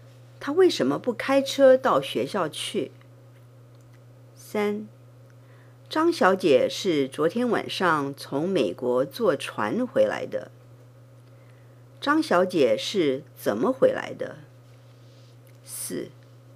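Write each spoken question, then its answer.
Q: 张小姐是怎么回来的?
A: 坐船回来的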